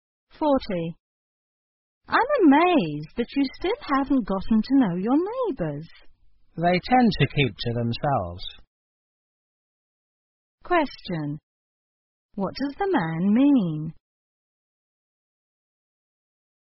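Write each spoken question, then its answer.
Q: What does the man mean?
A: His neighbours keep to themselves, so it's hard to get to know them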